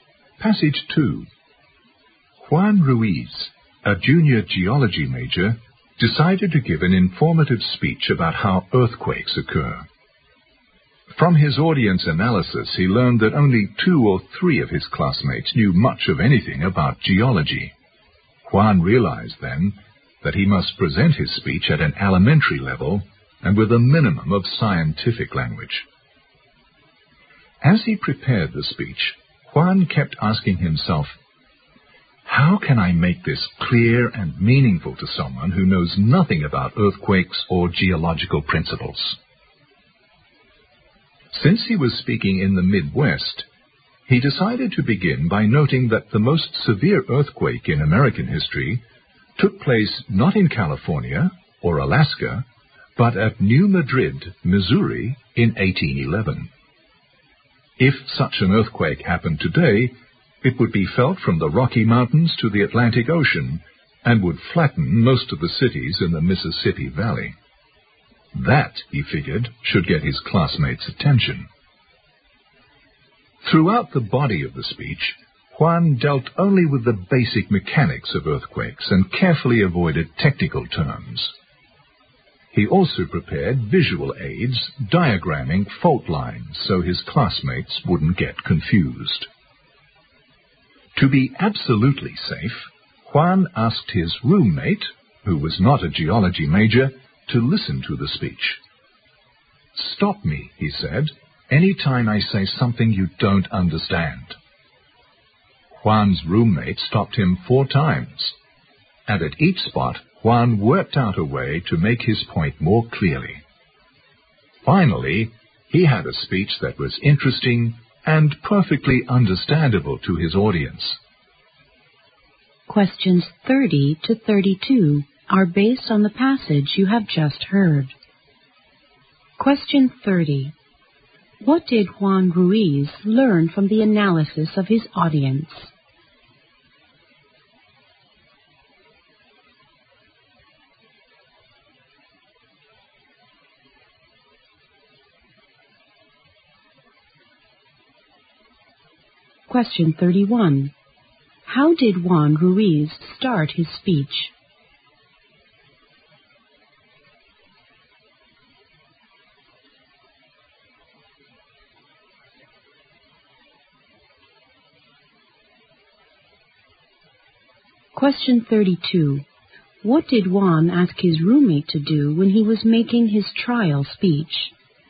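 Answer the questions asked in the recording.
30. Only two or three of his classmates knew much about geology.
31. He noted that the most severe US earthquake happened at New Madrid, Missouri, in 1811.
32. Stop him whenever he said something the roommate didn't understand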